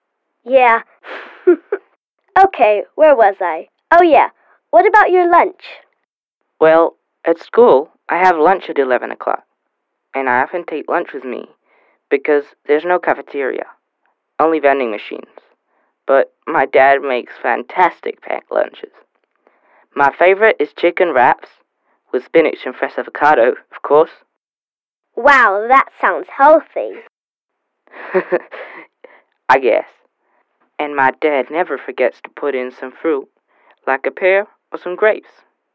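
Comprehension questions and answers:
Listen to a conversation between two friends and decide whether the statement is true or false.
At school Nelson has lunch at 12 o'clock.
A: False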